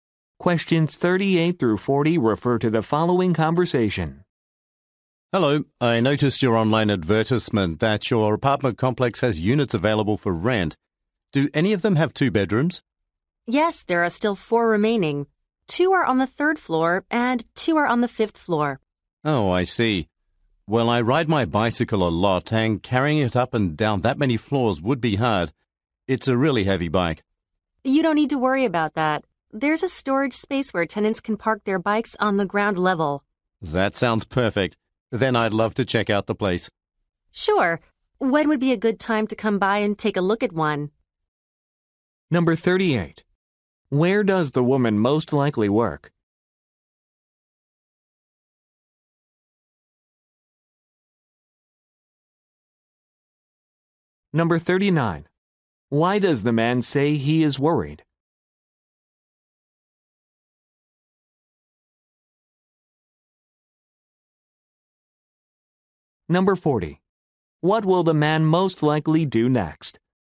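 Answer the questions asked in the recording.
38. At an apartment complex
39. Carrying his heavy bicycle up the stairs would be hard
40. Arrange a time to view an apartment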